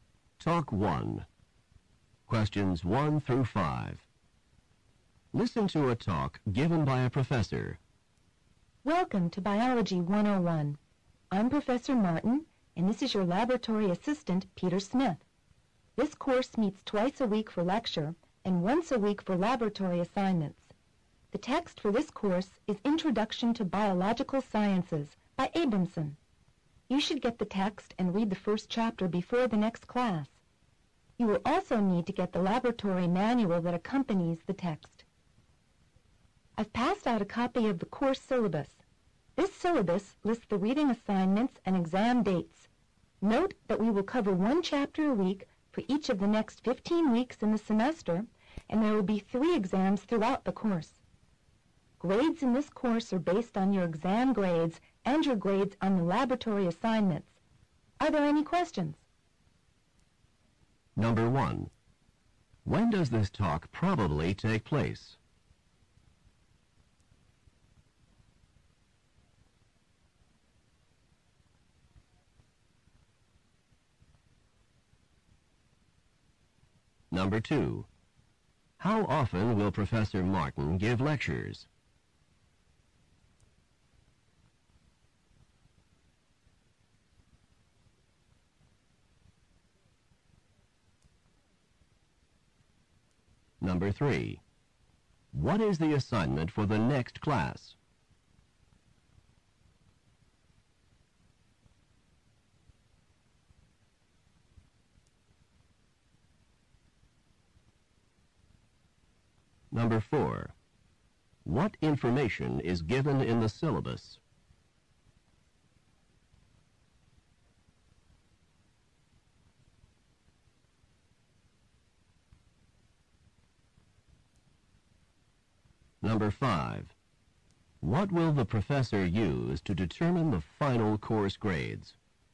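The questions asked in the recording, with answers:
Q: When does this talk probably take place?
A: On the first day of the course

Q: How often will Professor Martin give lectures?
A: Twice a week

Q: What is the assignment for the next class?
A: Read the first chapter

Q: What information is given in the syllabus?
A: Reading assignments and exam dates

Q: What will the professor use to determine the final course grades?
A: Exam grades and laboratory assignment grades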